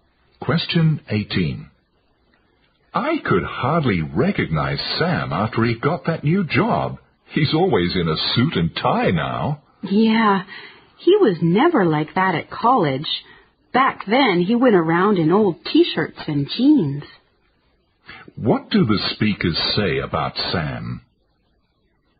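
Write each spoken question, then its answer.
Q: What do the speakers say about Sam?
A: He dresses much more formally now than he did in college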